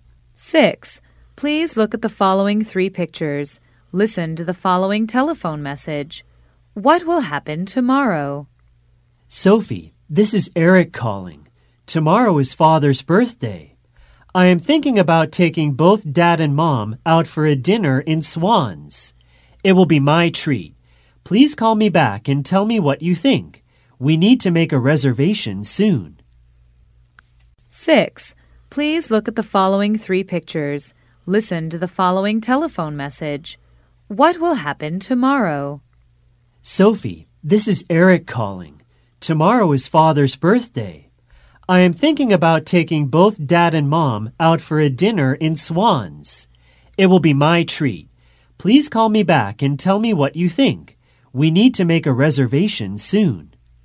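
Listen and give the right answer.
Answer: Father's birthday dinner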